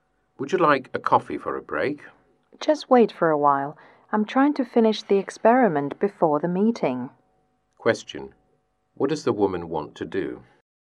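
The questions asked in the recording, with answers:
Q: What does the woman want to do?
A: Finish her experiment before the meeting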